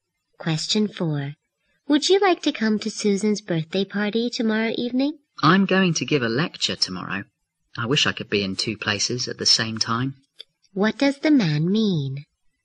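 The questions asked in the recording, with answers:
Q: What does the man mean?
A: He can't go to Susan's party because he is giving a lecture.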